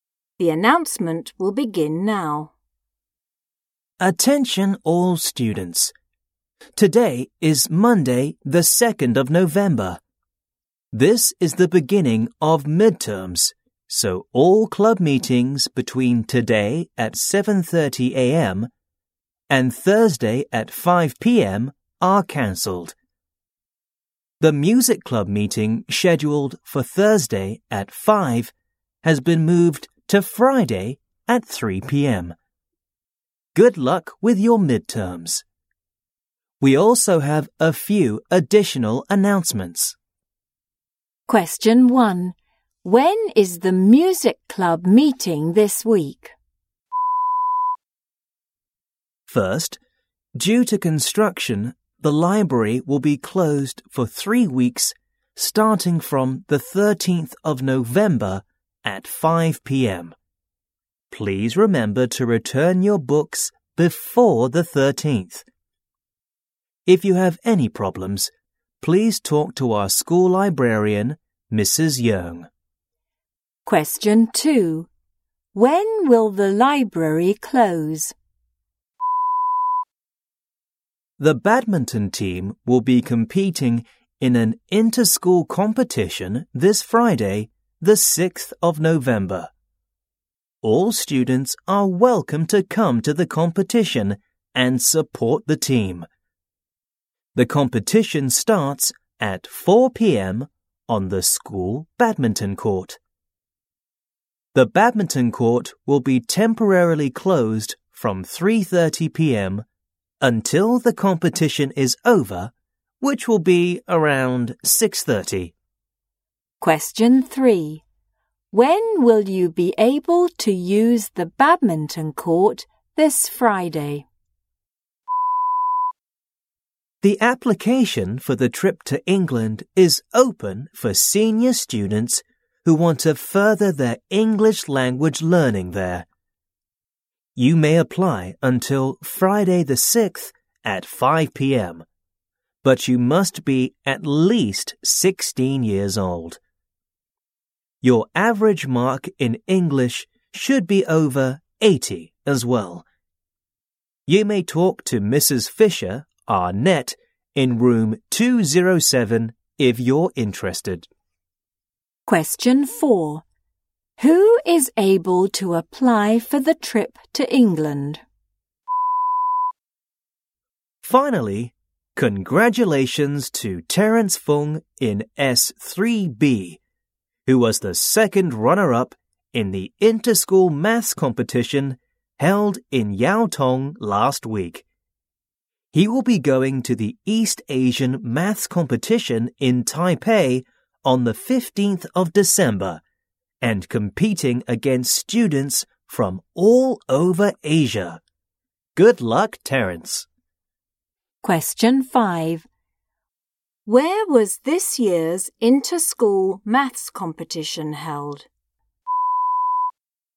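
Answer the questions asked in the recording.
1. Friday at 3 p.m.
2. From 5 p.m. on the 13th of November, for 3 weeks
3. Before 3:30 p.m. or after about 6:30 p.m.
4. Senior students aged at least 16 with an average English mark over 80
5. Yau Tong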